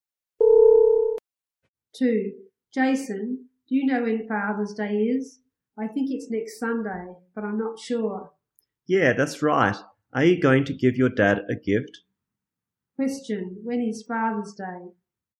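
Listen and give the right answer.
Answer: Next Sunday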